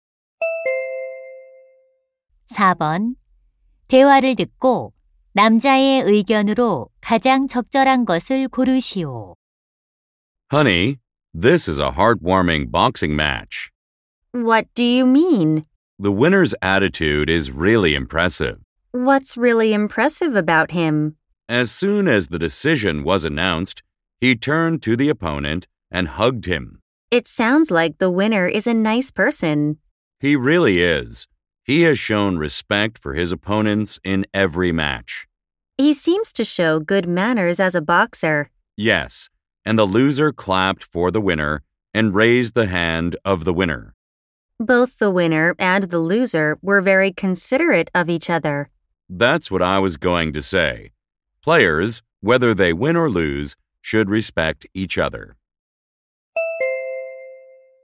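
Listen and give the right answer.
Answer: 선수들은 승패와 관계없이 서로 존중해야 한다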